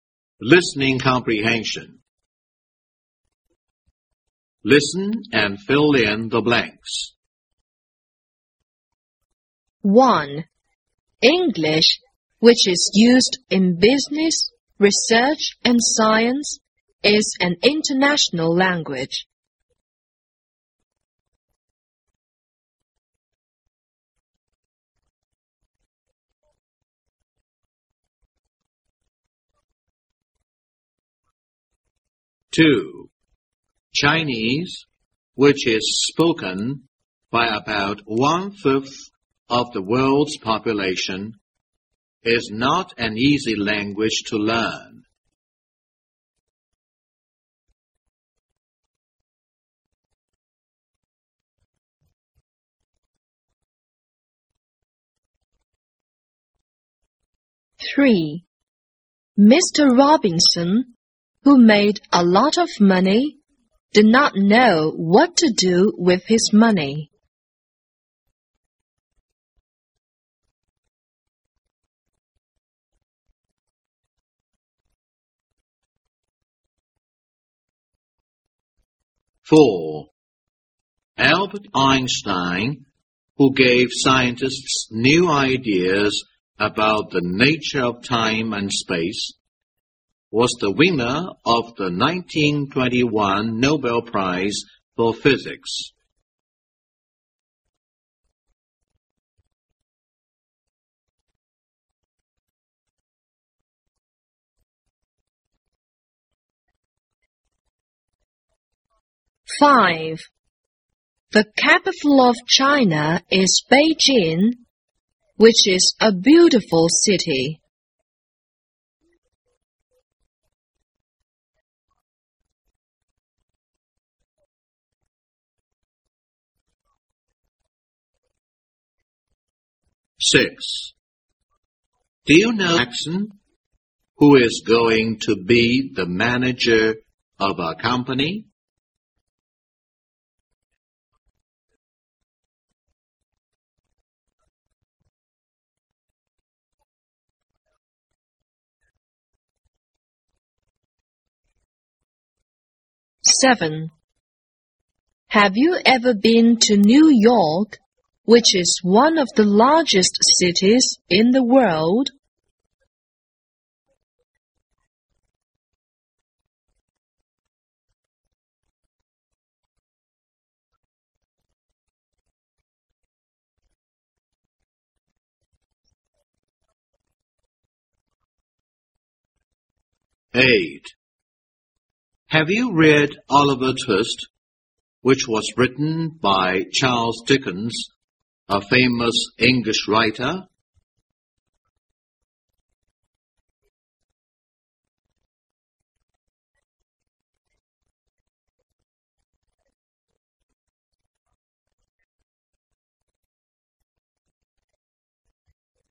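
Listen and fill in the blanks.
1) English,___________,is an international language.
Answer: which is used in business, research, and science

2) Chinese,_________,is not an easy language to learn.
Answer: which is spoken by about one-fifth of the world's population

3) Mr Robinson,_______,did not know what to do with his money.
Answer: who made a lot of money

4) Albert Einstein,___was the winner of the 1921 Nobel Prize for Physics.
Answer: who gave scientists new ideas about the nature of time and space

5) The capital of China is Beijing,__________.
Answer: which is a beautiful city

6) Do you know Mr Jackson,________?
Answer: who is going to be the manager of our company

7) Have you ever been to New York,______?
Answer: which is one of the largest cities in the world

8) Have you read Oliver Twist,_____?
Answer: which was written by Charles Dickens, a famous English writer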